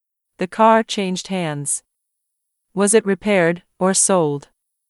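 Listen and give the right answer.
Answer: sold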